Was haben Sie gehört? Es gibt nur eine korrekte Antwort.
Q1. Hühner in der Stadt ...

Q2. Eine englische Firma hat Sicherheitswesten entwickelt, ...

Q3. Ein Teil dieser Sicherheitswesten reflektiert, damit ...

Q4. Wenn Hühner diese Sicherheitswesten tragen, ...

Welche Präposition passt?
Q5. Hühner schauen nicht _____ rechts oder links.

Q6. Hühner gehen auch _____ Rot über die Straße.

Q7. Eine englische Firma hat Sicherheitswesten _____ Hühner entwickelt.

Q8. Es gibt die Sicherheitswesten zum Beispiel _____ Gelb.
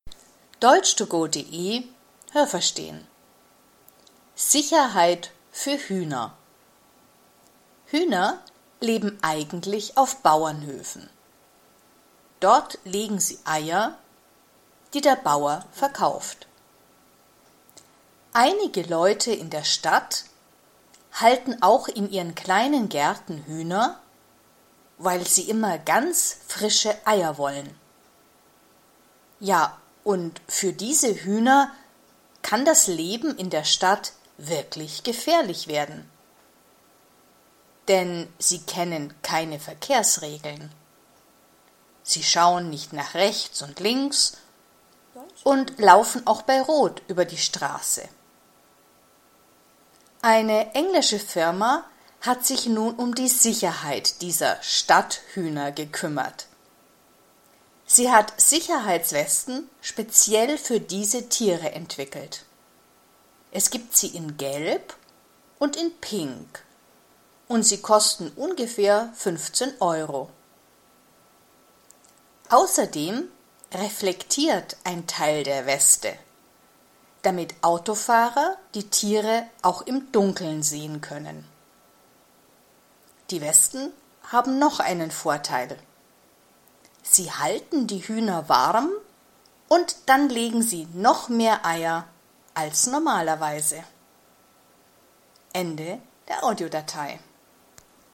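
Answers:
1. kennen keine Verkehrsregeln, ihr Leben kann gefährlich werden
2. speziell für Stadthühner, in Gelb und Pink, für ungefähr 15 Euro
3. Autofahrer die Tiere auch im Dunkeln sehen können
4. bleiben sie warm und legen mehr Eier als normalerweise
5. nach
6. bei
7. für
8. in

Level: Hörtexte A (einfach)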